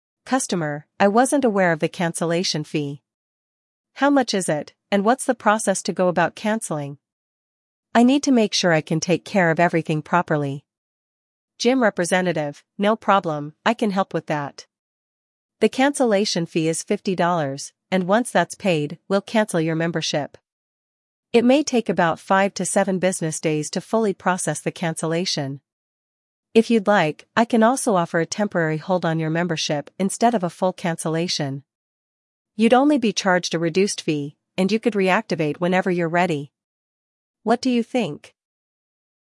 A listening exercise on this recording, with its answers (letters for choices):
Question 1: What alternative does the gym representative offer to the customer?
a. A free month of membership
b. A reduced fee for a temporary hold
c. A permanent suspension of the membership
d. A full refund for the unused months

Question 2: How long will it take to process the cancellation after the fee is paid?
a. 1-2 business days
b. 5-7 business days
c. 10-14 business days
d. 3-5 business days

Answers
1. b
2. b

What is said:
Customer: "I wasn't aware of the cancellation fee. How much is it, and what's the process to go about canceling? I need to make sure I can take care of everything properly."
Gym Representative: "No problem, I can help with that. The cancellation fee is $50, and once that's paid, we'll cancel your membership. It may take about 5-7 business days to fully process the cancellation. If you'd like, I can also offer a temporary hold on your membership instead of a full cancellation. You'd only be charged a reduced fee, and you could reactivate whenever you're ready. What do you think?"